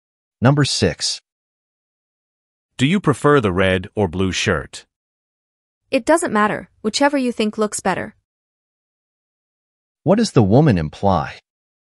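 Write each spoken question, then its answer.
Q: What does the woman imply?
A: She has no preference between the two shirts.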